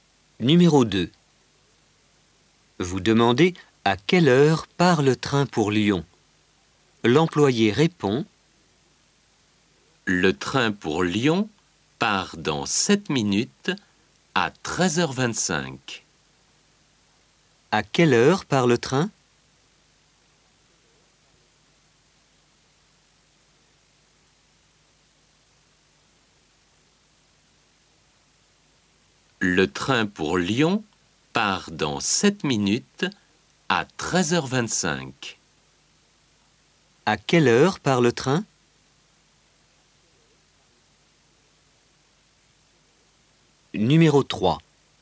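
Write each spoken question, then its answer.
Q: À quelle heure part le train?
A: À 13h25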